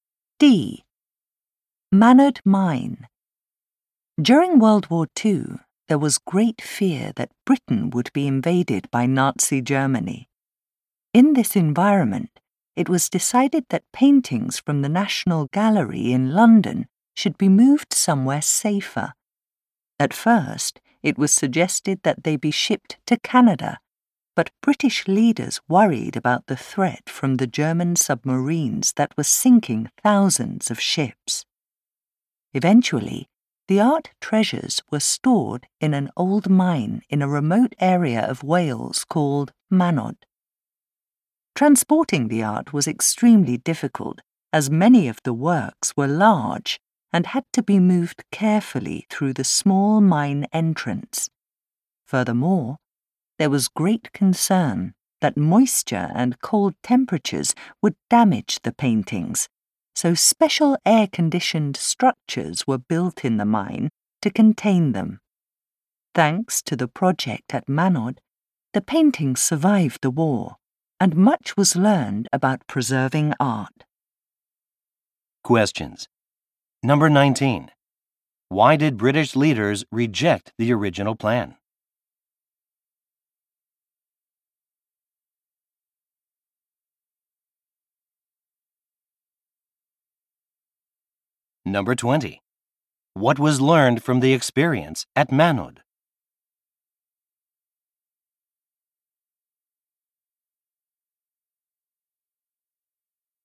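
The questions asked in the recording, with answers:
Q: Why did British leaders reject the original plan?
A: German submarines were sinking ships

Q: What was learned from the experience at Manod?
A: Much about preserving art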